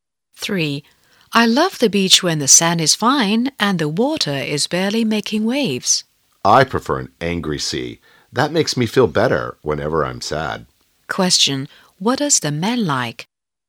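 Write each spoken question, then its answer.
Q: Question. What does the man like?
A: A rough, angry sea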